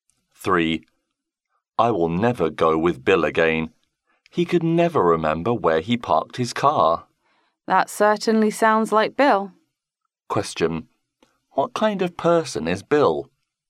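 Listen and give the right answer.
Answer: Forgetful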